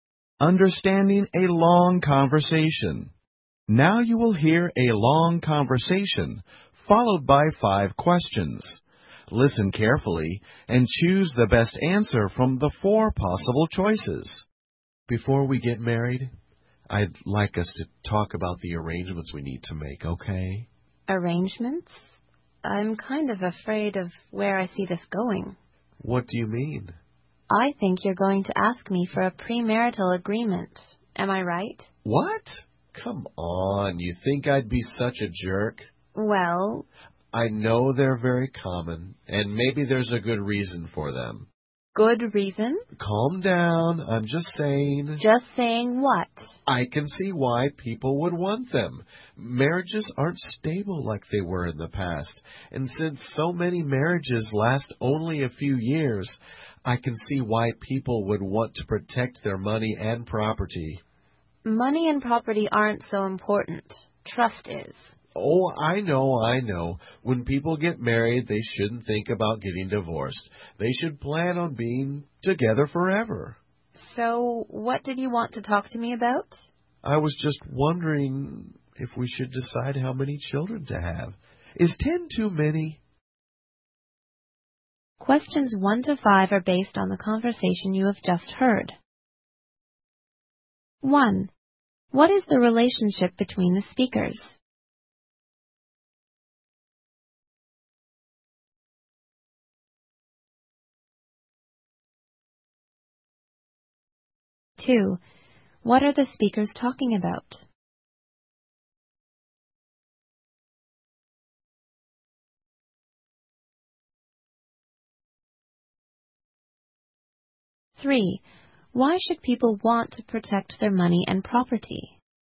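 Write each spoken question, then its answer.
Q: What is the relationship between the speakers?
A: An engaged couple about to get married

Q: Why should people want to protect their money and property?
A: Because marriages aren't stable and many last only a few years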